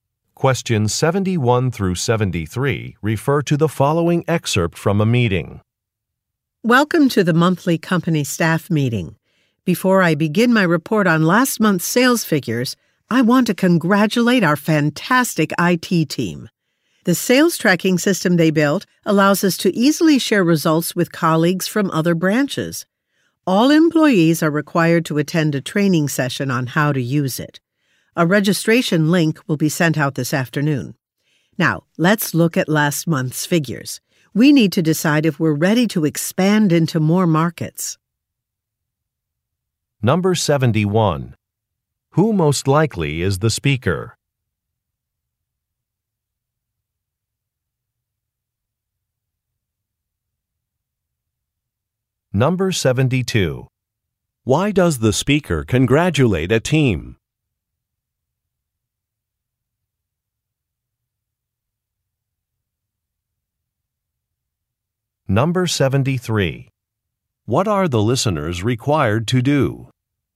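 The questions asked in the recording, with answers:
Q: Why does the speaker congratulate a team?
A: They built a sales tracking system

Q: What are the listeners required to do?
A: Attend a training session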